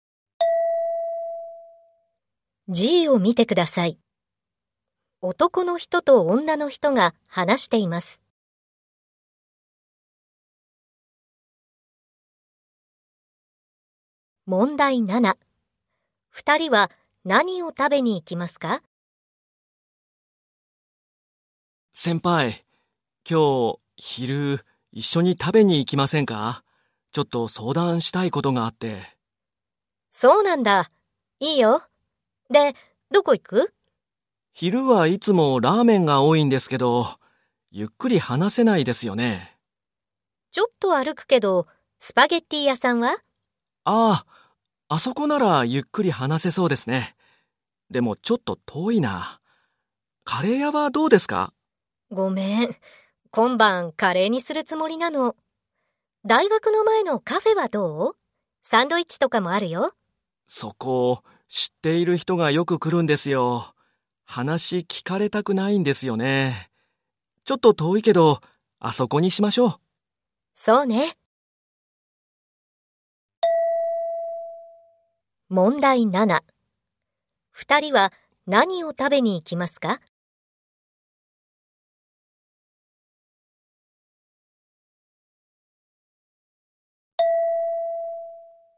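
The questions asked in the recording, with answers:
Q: 二人は何を食べに行きますか?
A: スパゲッティ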